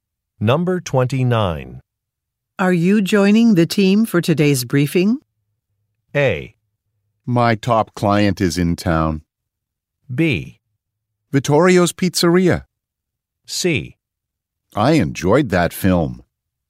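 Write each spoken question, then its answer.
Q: Are you joining the team for today's briefing?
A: A: My top client is in town.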